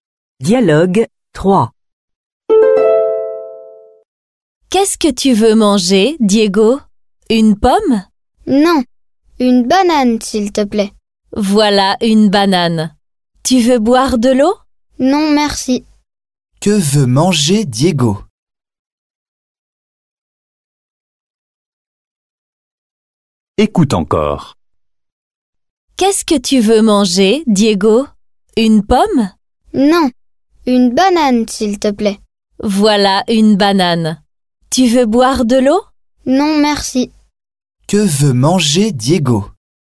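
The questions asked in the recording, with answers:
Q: Que veut manger Diego?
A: une banane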